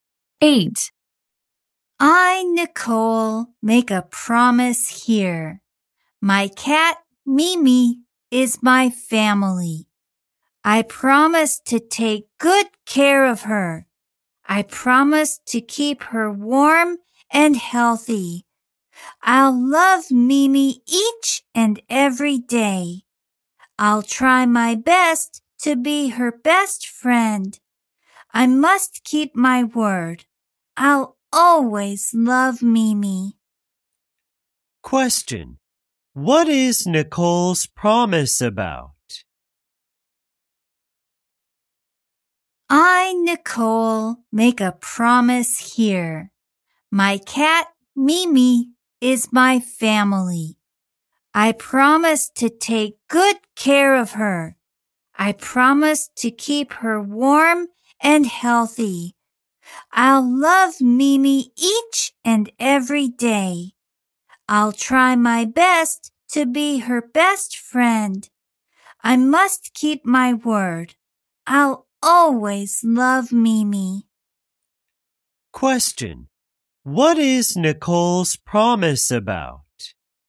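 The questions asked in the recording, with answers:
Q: Question. What is Nicole's promise about?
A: Taking good care of her cat, Mimi.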